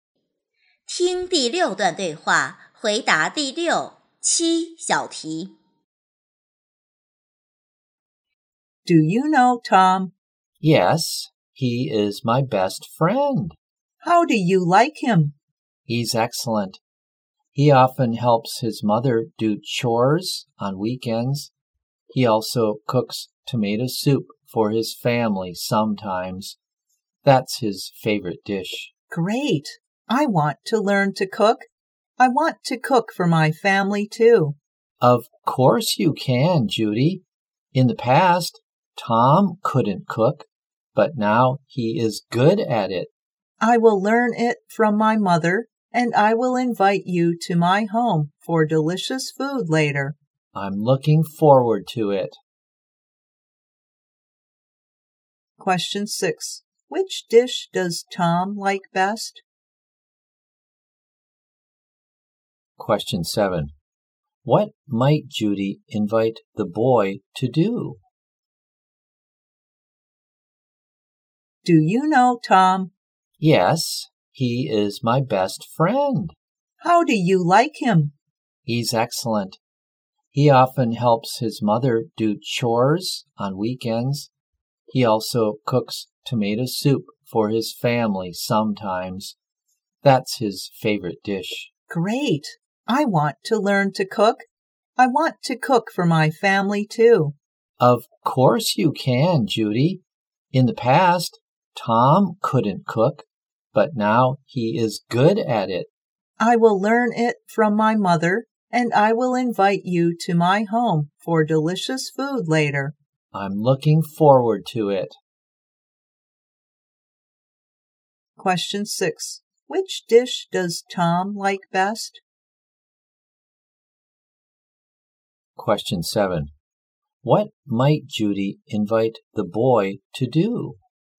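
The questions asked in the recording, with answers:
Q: Question 6. Which dish does Tom like best?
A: Tomato soup

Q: Question 7. What might Judy invite the boy to do?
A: Come to her home for delicious food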